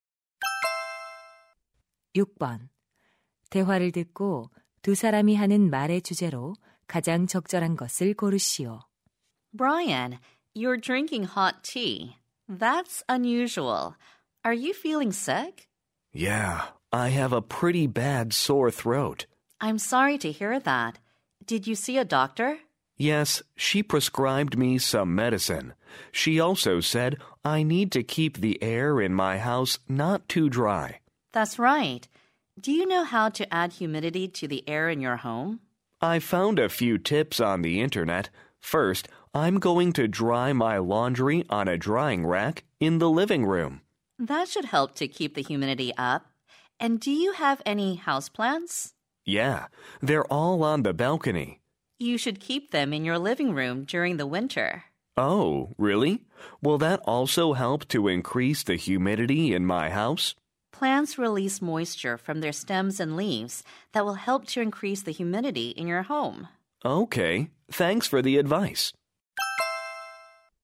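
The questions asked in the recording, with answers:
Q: 대화를 듣고 두 사람이 하는 말의 주제로 가장 적절한 것을 고르시오.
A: 실내 습도를 높이는 방법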